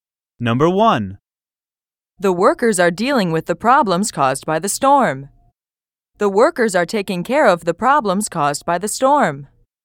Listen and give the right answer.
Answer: Same as the correct answer.